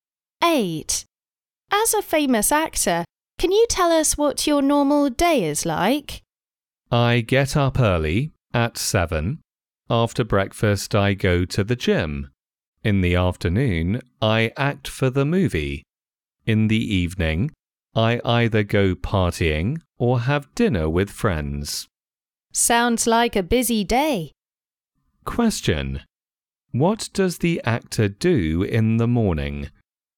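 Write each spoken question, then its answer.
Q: What does the actor do in the morning?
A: He goes to the gym after breakfast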